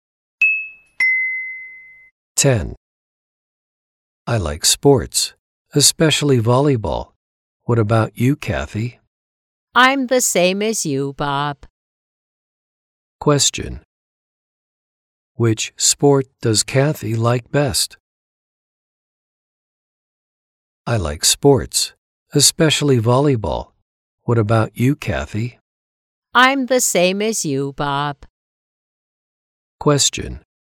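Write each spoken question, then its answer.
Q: Which sport does Kathy like best?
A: Volleyball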